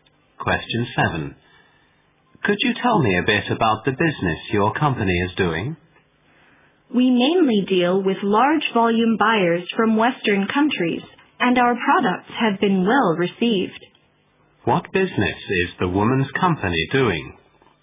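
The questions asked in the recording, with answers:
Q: What business is the woman's company doing?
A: Selling products in large volumes to buyers from Western countries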